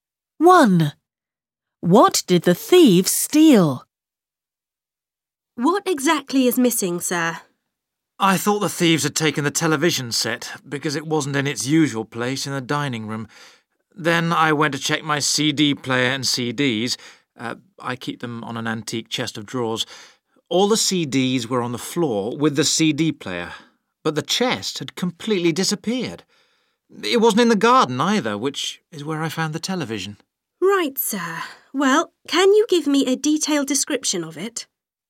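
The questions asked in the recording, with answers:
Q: What did the thieves steal?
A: an antique chest of drawers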